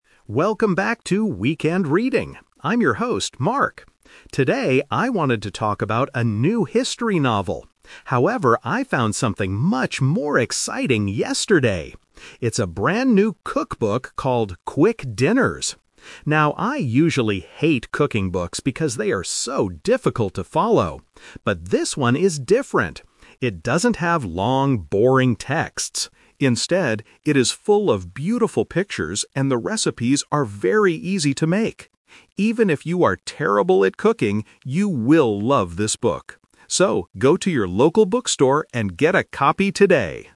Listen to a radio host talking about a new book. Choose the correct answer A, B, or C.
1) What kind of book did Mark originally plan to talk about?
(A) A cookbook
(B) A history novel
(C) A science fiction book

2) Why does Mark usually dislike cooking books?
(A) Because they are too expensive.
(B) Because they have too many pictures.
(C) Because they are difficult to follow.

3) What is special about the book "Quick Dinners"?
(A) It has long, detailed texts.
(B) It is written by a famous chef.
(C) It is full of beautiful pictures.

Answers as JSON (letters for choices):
{"1": "B", "2": "C", "3": "C"}

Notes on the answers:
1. Mark says at the beginning, "Today, I wanted to talk about a new history novel. However..." Trap: Option A (A cookbook) is a trap. It is the book he actually talks about, not the one he originally planned to talk about. Option C is not mentioned in the audio.
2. Mark clearly states, "I usually hate cooking books because they are so difficult to follow." Trap: Option A is a logical guess in real life, but it is not mentioned. Option B is a trap because having many pictures is what he likes about the new book, not the reason he dislikes old ones.
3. Mark describes the new book by saying, "Instead, it is full of beautiful pictures and the recipes are very easy to make." Trap: Option A is a trap using negative instruction. He says the book "doesn't have" long texts, so option A is incorrect. Option B is not mentioned in the audio.

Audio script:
Mark: Welcome back to "Weekend Reading". I'm your host, Mark. Today, I wanted to talk about a new history novel. However, I found something much more exciting yesterday! It's a brand new cookbook called "Quick Dinners". Now, I usually hate cooking books because they are so difficult to follow. But, this one is different. It doesn't have long, boring texts. Instead, it is full of beautiful pictures and the recipes are very easy to make. Even if you are terrible at cooking, you will love this book. So, go to your local bookstore and get a copy today!

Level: A2